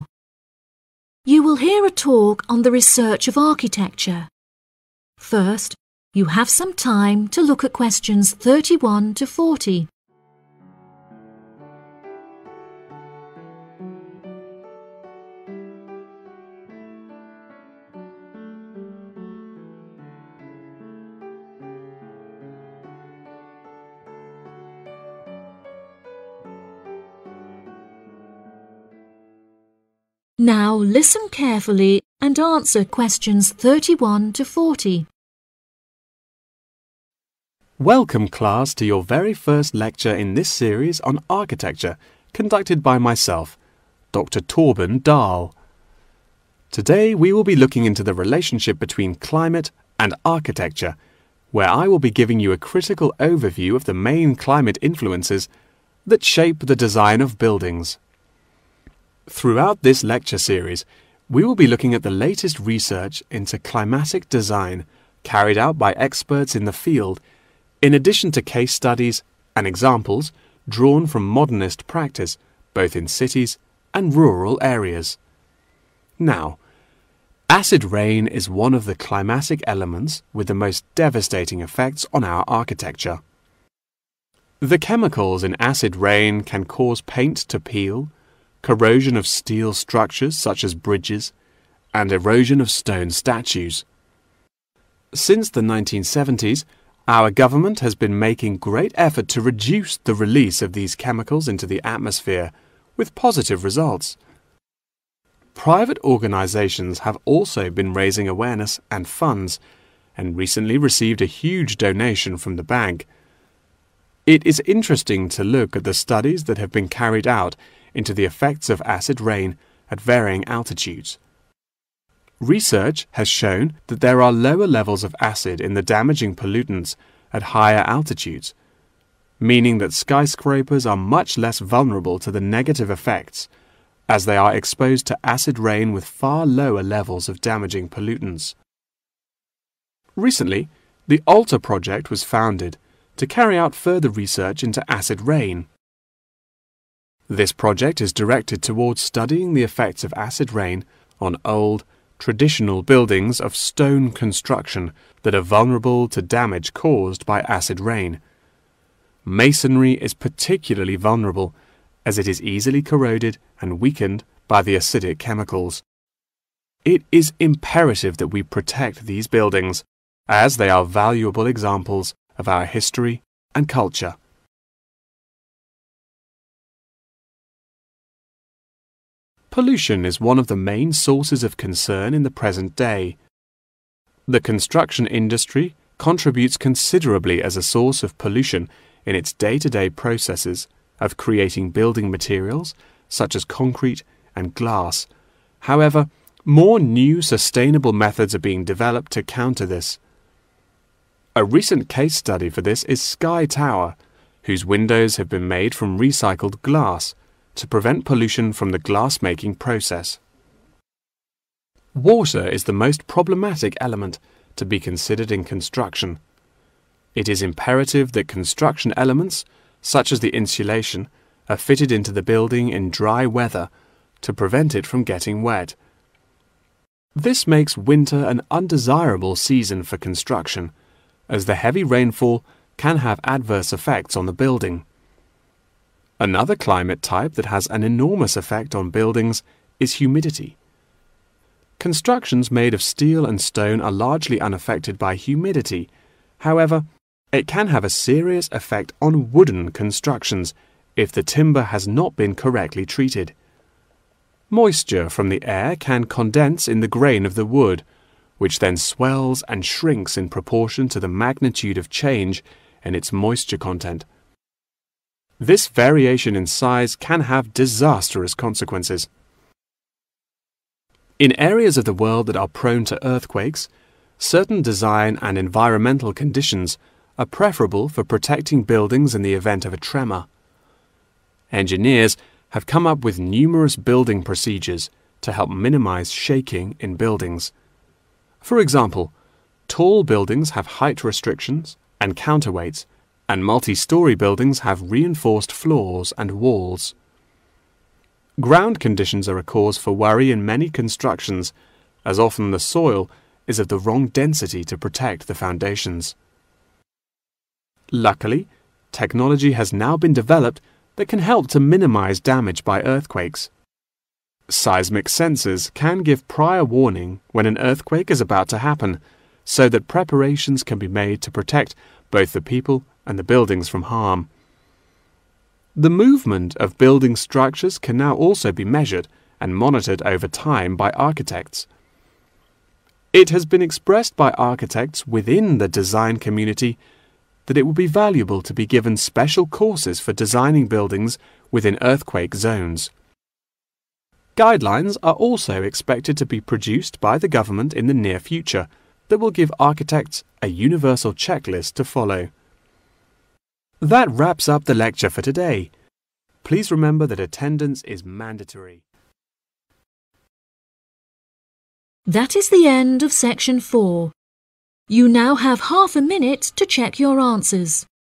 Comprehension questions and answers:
Complete the notes below. Write NO MORE THAN TWO WORDS for each answer.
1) Cases and examples are from practice conducted in 1______________ as well as rural areas.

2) Funds have been received from a 2______________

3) 3______________experience lower levels of acid in damaging pollutants.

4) In recent years, Alter Project focuses on the buildings made of 4______________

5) 5______________ is used to reduce pollution in Sky Tower.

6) Construction is affected by the increased 6______________ in winter.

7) Humidity affects the 7______________ buildings whose grain can be condensed by moisture from the air.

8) Ground conditions can be a problem when the density of the 8______________ is wrong.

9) Architects can now monitor the 9______________ of buildings.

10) The government should make 10______________ for the architects.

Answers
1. cities
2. bank
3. Skyscrapers
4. stone
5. Recycled glass
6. rainfall
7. wooden
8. soil
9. movement
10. guidelines

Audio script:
Climate And Architecture
Welcome class to your very first lecture in this series on Architecture conducted by myself, Dr Torben Dahl.
Today we will be looking into the relationship between climate and architecture, where I will be giving you a critical overview of the main climate influences that shape the design of buildings.
Throughout this lecture series we will be looking at the latest research into climatic design carried out by experts in the field in addition to case studies and examples drawn from modernist practice both in cities and rural areas.
Now, acid rain is one of the climatic elements with the most devastating effects on our architecture.
The chemicals in acid rain can cause paint to peel, corrosion of steel structures such as bridges, and erosion of stone statues.
Since the 1970s, our government has been making great effort to reduce the release of these chemicals into the atmosphere with positive results.
Private organisations have also been raising awareness and funds and recently received a huge donation from the bank.
It is interesting to look at the studies that have been carried out into the effects of acid rain at varying altitudes.
Research has shown that there are lower levels of acid in the damaging pollutants at higher altitudes, meaning that skyscrapers are much less vulnerable to the negative effects as they are exposed to acid rain with far lower levels of damaging pollutants.
Recently, the Alter Project was founded to carry out further research into acid rain.
This project is directed towards studying the effects of acid rain on old, traditional buildings of stone construction that are vulnerable to damage caused by acid rain.
Masonry is particularly vulnerable as it is easily corroded and weakened by the acidic chemicals.
It is imperative that we protect these buildings, as they are valuable examples of our history and culture.
Pollution is one of the main sources of concern in the present day.
The construction industry contributes considerably as a source of pollution in its day-to-day processes of creating building materials such as concrete and glass, however, more new sustainable methods are being developed to counter this.
A recent case study for this is Sky Tower, whose windows have been made from recycled glass to prevent pollution from the glass-making process.
Water is the most problematic element to be considered in construction.
It is imperative that construction elements such as the insulation are fitted into the building in dry weather to prevent it from getting wet.
This makes winter an undesirable season for construction as the heavy rainfall can have adverse effects on the building.
Another climate type that has an enormous affect on buildings is humidity
Constructions made of steel and stone are largely unaffected by humidity, however, it can have a serious effect on wooden constructions if the timber has not been correctly treated.
Moisture from the air can condense in the grain of the wood, which then swells and shrinks in proportion to the magnitude of change in its moisture content.
This variation in size can have disastrous consequences.
In areas of the world that are prone to earthquakes, certain design and environmental conditions are preferable for protecting buildings in the event of a tremor.
Engineers have come up with numerous building procedures to help minimise shaking in buildings.
Ground conditions are a cause for worry in many constructions as often the soil is of the wrong density to protect the foundations.
Luckily technology has now been developed that can help to minimise damage by earthquakes.
Seismic sensors can give prior warning when an earthquake is about to happen so that preparations can be made to protect both the people and the buildings from harm.
The movement of building structures can now also be measured and monitored over time by architects.
It has been expressed by architects within the design community that it would be valuable to be given special courses for designing buildings within earthquake zones.
Guidelines are also expected to be produced by the government in the near future that will give architects a universal checklist to follow.
That wraps up the lecture for today. Please remember that attendance is mandatory...